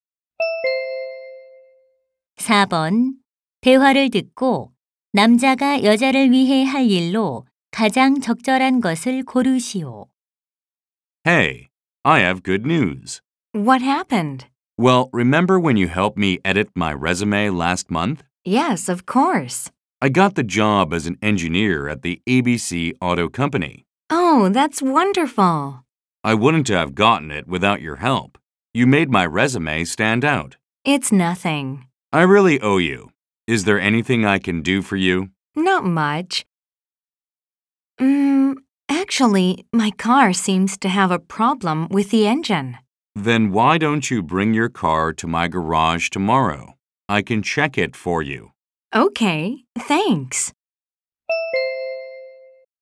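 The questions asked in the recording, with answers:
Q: 대화를 듣고 남자가 여자를 위해 할 일로 가장 적절한 것을 고르시오.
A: 여자의 자동차 엔진 점검하기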